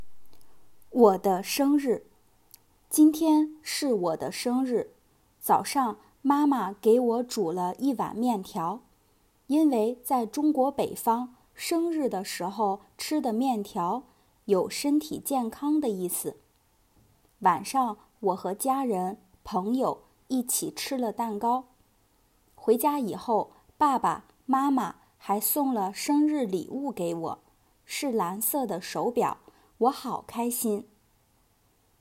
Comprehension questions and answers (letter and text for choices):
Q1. 早上我吃了什么?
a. 面条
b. 饺子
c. 面包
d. 鸡蛋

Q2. 手表是什么颜色的?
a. 绿色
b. 黄色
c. 蓝色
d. 白色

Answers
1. a. 面条
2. c. 蓝色

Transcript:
我的生日 今天是我的生日,早上,妈妈给我煮了一碗面条,因为在中国北方,生日的时候吃的面条,有身体健康的意思。 晚上,我和家人,朋友一起吃了蛋糕。 回家以后,爸爸妈妈还送了生日礼物给我,是蓝色的手表,我好开心!